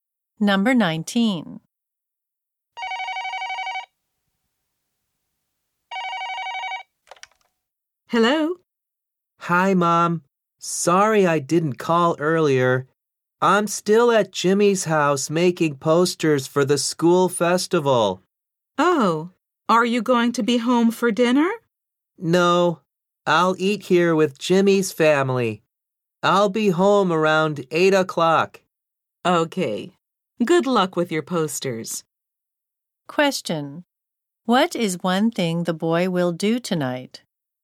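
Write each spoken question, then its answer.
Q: What is one thing the boy will do tonight?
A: Eat dinner with Jimmy's family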